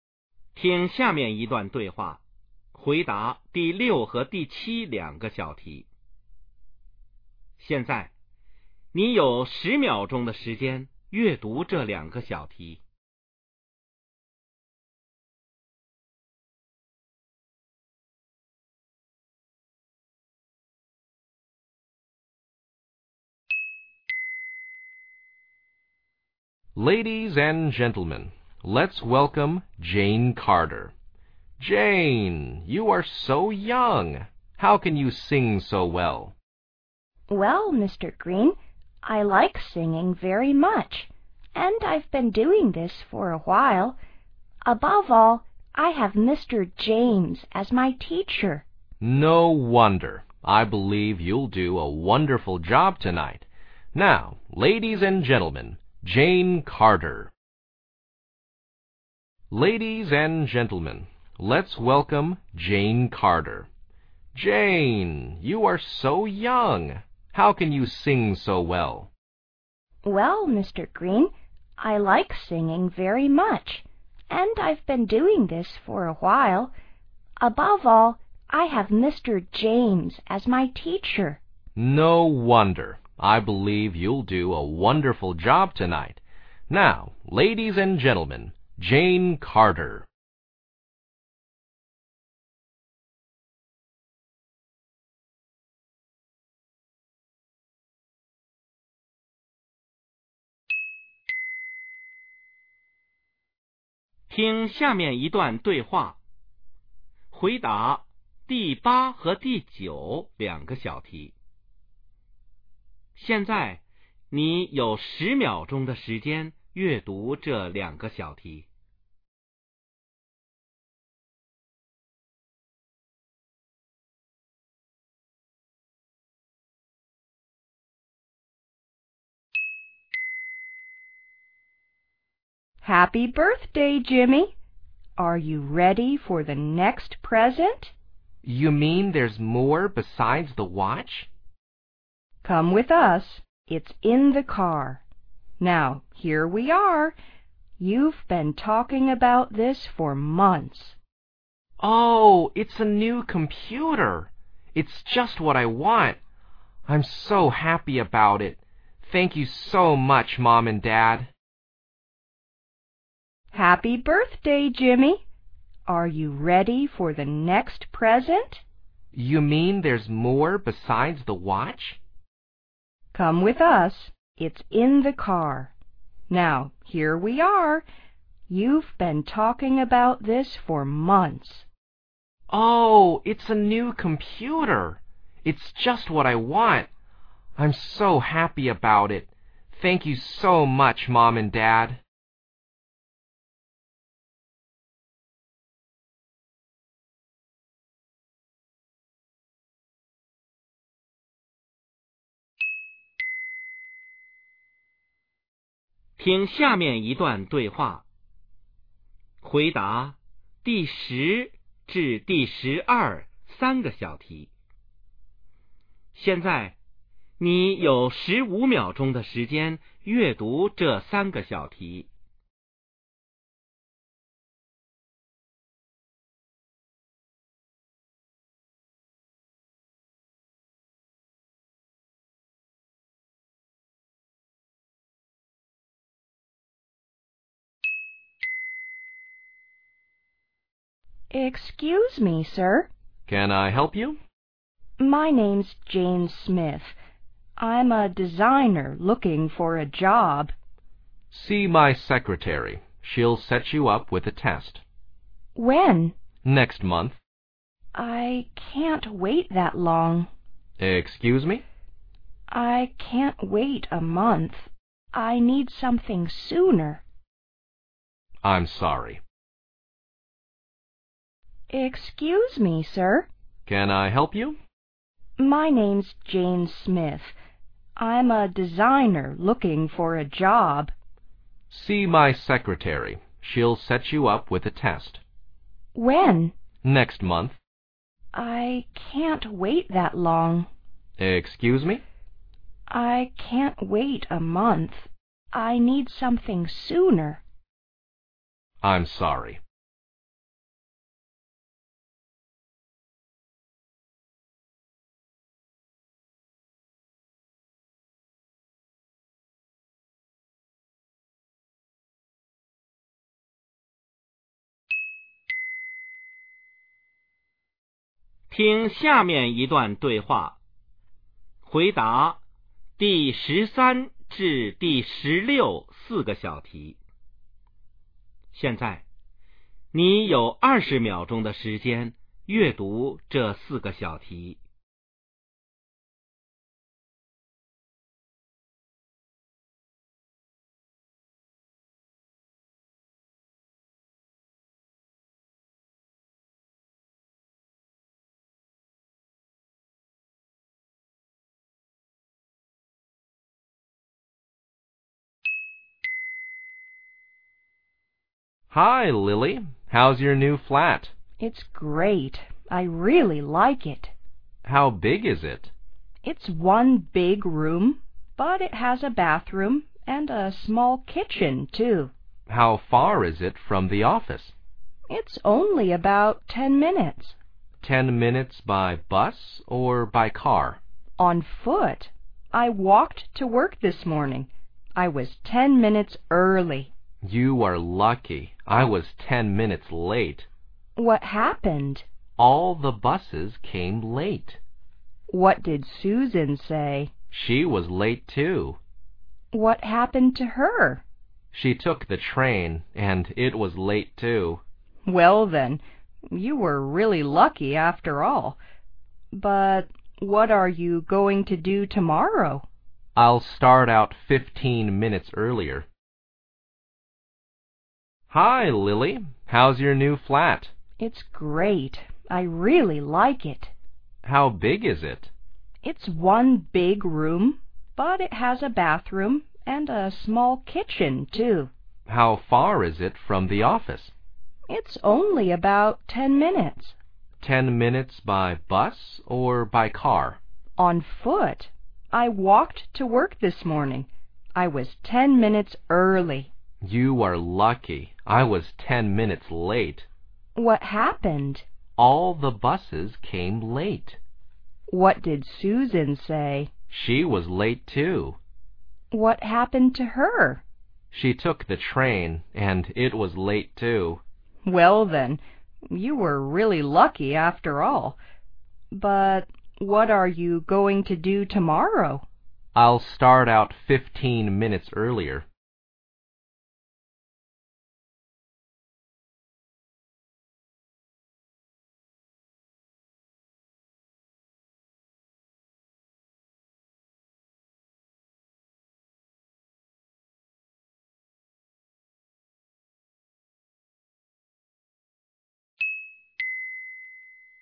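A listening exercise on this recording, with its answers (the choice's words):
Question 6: What is the man doing?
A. Giving a speech.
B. Chairing a meeting.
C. Introducing a person.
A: Introducing a person.

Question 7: Why does the woman sing so well?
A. She has a great teacher.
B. She teaches singing.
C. She is young.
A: She has a great teacher.

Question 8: What is the second gift for Jimmy?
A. A car.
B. A watch.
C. A computer.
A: A computer.

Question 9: Why does Jimmy feel happy?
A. He lives with his parents.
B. He's got what he dreamt of.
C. He's received lots of presents.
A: He's got what he dreamt of.

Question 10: What is the relationship between the speakers?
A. They are friends.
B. They are strangers to each other.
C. They are husband and wife.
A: They are strangers to each other.

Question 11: Why does the woman come to talk with the man?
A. To get a job.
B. To take a test.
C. 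To see the secretary.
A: To get a job.

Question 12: What does the man mean by saying sorry?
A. He can't hear the woman clearly.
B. He doesn't need a designer.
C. He can't help the woman.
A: He can't help the woman.

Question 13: What do we know about the woman?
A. She lives close to the office.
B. She is new to the company.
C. She likes the big kitchen.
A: She lives close to the office.

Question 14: How does the man go to work?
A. On foot.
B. By bus.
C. By car.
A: By bus.

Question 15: Why was Susan late for work?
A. She missed the bus.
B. Her train was late.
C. Her car broke down.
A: Her train was late.

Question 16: What will the man do the next day?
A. Go to work by train.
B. Visit Lily in her flat.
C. Leave home earlier.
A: Leave home earlier.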